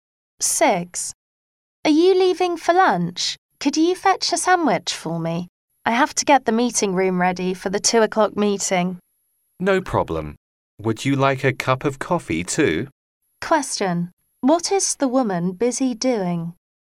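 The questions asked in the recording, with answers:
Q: What is the woman busy doing?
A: Getting the meeting room ready for a meeting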